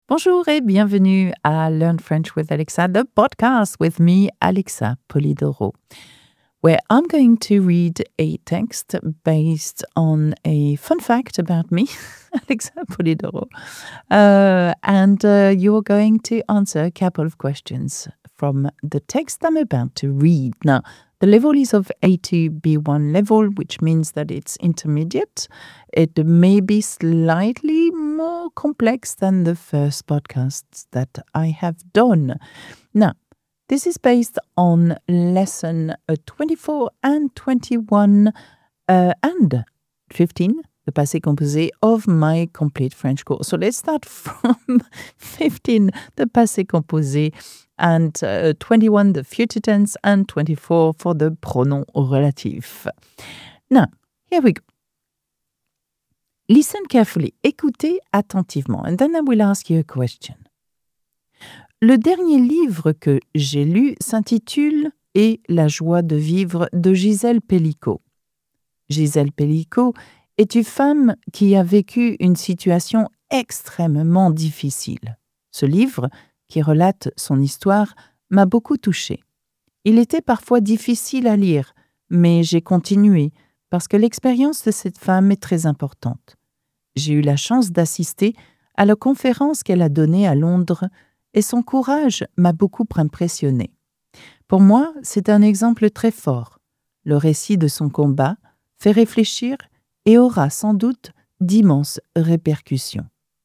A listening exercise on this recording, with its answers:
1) Quel est le titre du dernier livre que j'ai lu ?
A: Le titre du dernier livre qu'Alexa a lu est Et la joie de vivre.

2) Qu'est-ce qui m'a beaucoup impressionnée chez Gisèle Pelicot ?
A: Alexa a été impressionnée par le courage de Gisèle Pelicot.